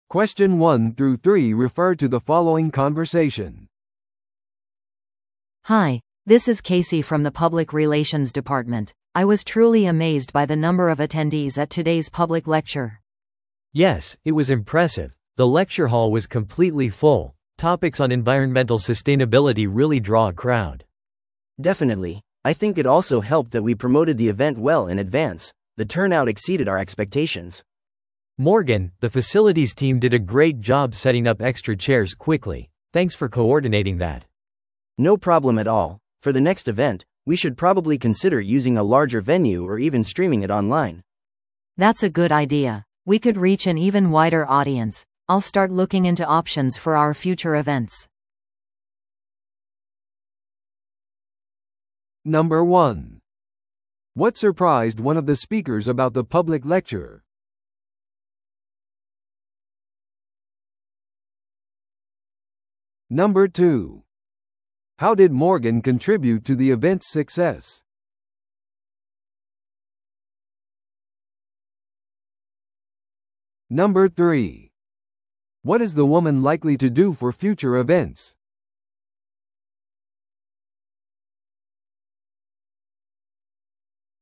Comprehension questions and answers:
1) What surprised one of the speakers about the public lecture?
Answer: 多数の出席者。

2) How did Morgan contribute to the event's success?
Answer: 追加の座席を確保すること。

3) What is the woman likely to do for future events?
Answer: 異なる会場と形式について調査する。

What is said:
A: Hi, this is Casey from the public relations department. I was truly amazed by the number of attendees at today's public lecture!
B: Yes, it was impressive. The lecture hall was completely full. Topics on environmental sustainability really draw a crowd.
C: Definitely. I think it also helped that we promoted the event well in advance. The turnout exceeded our expectations.
B: Morgan, the facilities team did a great job setting up extra chairs quickly. Thanks for coordinating that.
C: No problem at all. For the next event, we should probably consider using a larger venue or even streaming it online.
A: That's a good idea. We could reach an even wider audience. I'll start looking into options for our future events.